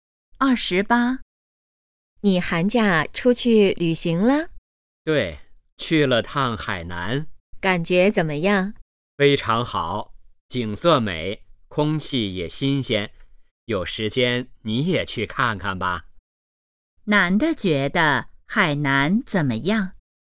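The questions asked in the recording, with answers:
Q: 男的觉得海南怎么样?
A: 景色美,空气新鲜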